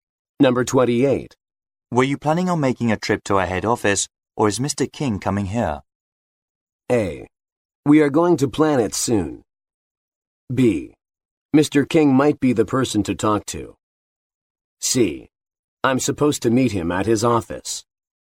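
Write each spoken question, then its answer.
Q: Were you planning on making a trip to our head office, or is Mr.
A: C: I'm supposed to meet him at his office.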